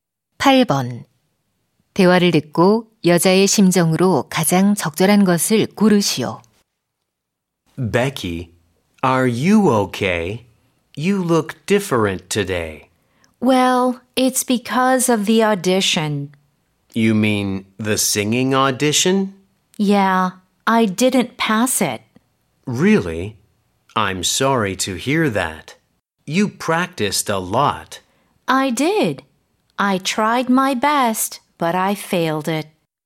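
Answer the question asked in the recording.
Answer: 실망한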